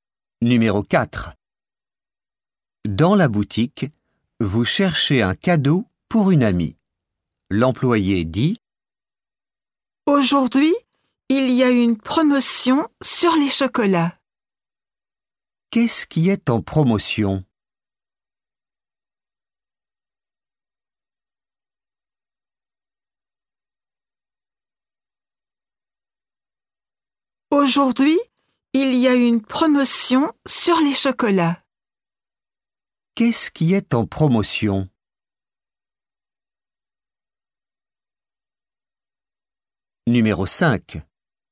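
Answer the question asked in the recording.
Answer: les chocolats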